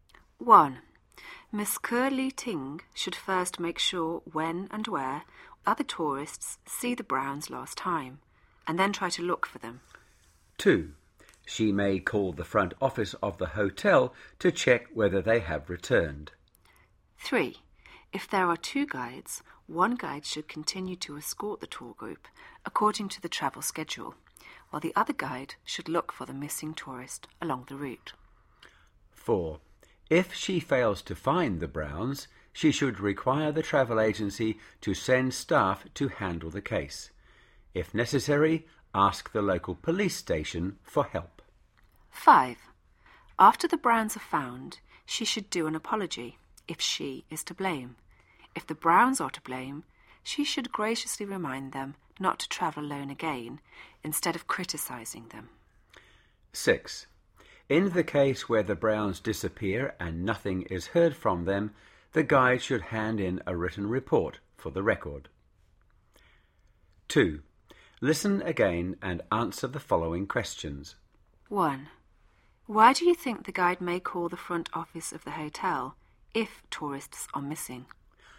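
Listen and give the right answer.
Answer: To check whether the missing tourists have returned to the hotel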